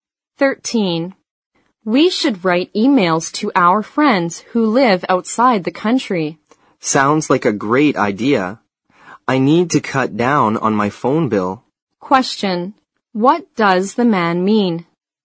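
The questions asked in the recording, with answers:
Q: What does the man mean?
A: He agrees with the idea because emailing would reduce his phone bill.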